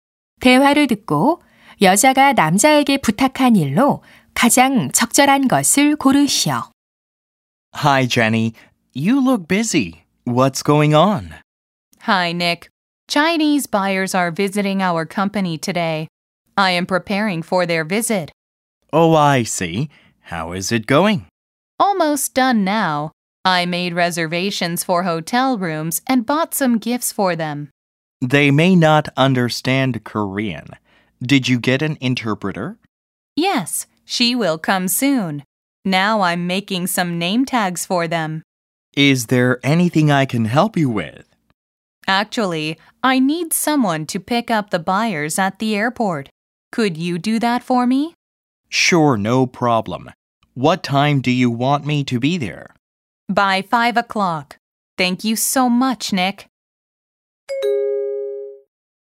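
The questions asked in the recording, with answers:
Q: 대화를 듣고 여자가 남자에게 부탁한 일로 가장 적절한 것을 고르시오.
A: 공항에 바이어 마중 나가기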